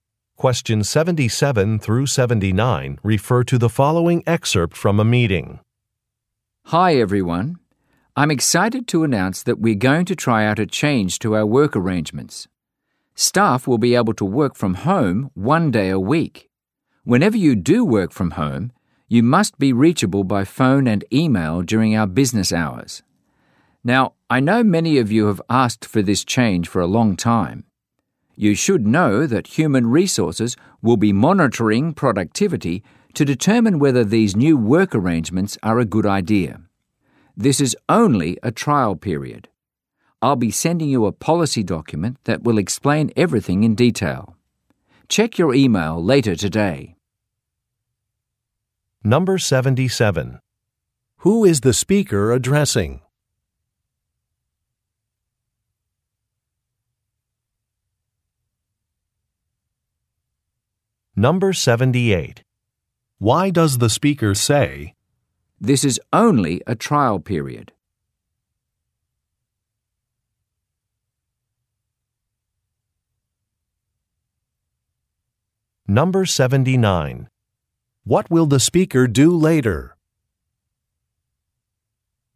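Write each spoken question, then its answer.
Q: What will the speaker do later?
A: Send a policy document by email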